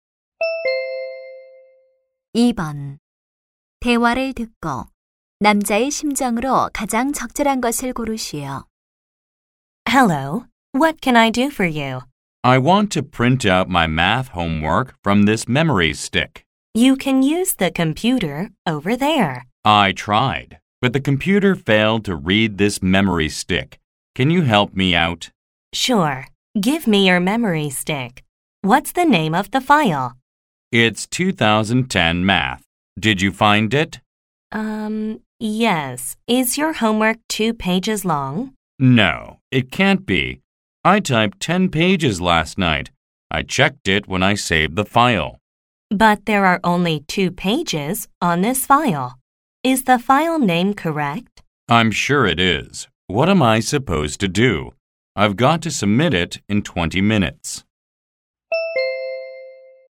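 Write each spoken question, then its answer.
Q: 대화를 듣고 남자의 심정으로 가장 적절한 것을 고르시오.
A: 초조하다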